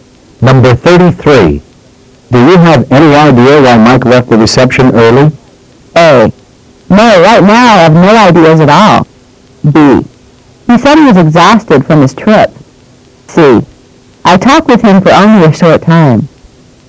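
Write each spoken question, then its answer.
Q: Do you have any idea why Mike left the reception early?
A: B: He said he was exhausted from his trip.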